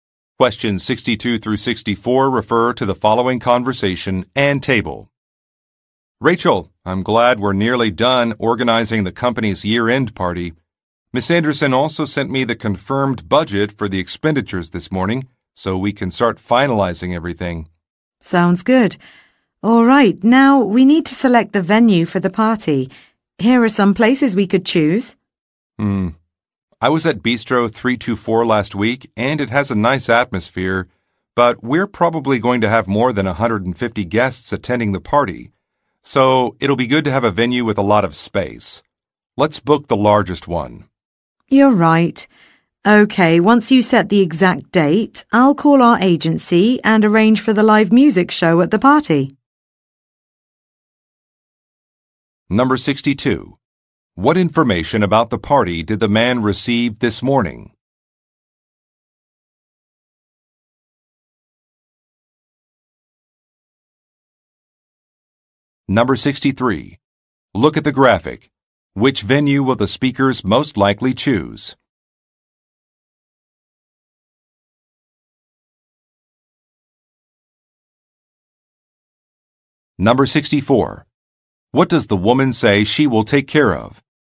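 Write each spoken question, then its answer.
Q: What information about the party did the man receive this morning?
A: The confirmed budget for the expenditures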